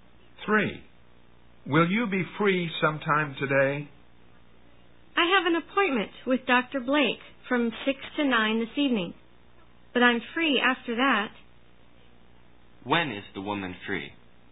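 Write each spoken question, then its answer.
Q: When is the woman free?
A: After 9 this evening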